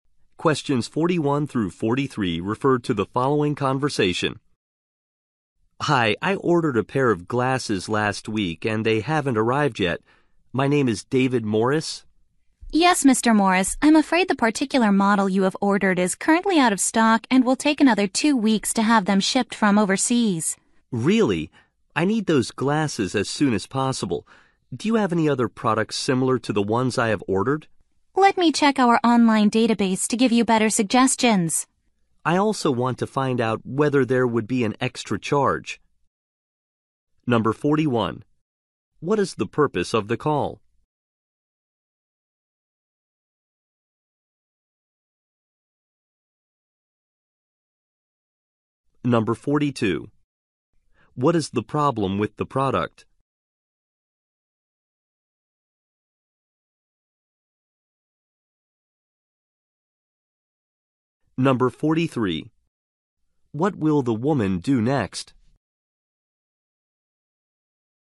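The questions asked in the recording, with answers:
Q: What is the purpose of the call?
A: To ask about glasses that have not arrived

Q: What is the problem with the product?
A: It is out of stock

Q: What will the woman do next?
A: Check the online database for similar products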